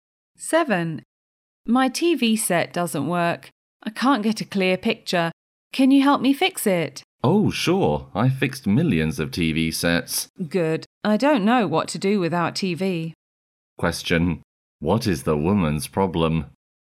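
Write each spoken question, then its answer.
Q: What is the woman's problem?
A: Her TV set doesn't work; she can't get a clear picture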